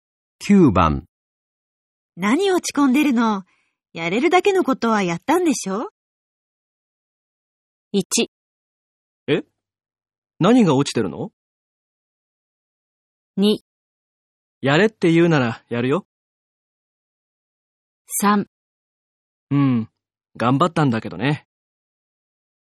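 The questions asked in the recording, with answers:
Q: 何落ち込んでるの?やれるだけのことはやったんでしょ?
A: 3: うん、頑張ったんだけどね。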